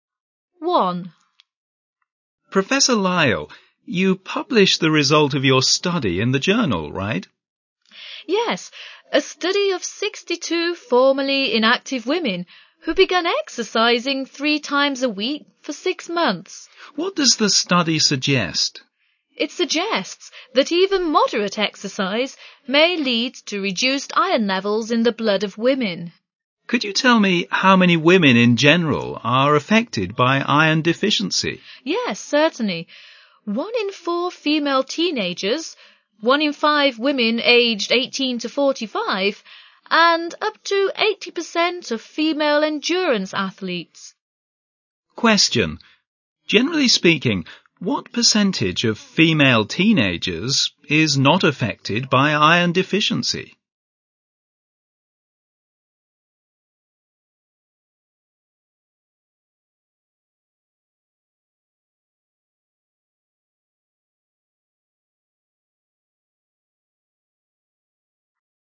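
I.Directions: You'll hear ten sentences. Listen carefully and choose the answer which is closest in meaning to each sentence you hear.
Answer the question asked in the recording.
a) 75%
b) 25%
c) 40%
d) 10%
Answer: a) 75%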